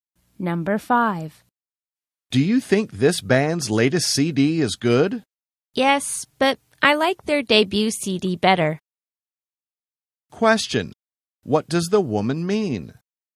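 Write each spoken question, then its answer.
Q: Question, what does the woman mean?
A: She likes the band's first (debut) CD better than the latest one.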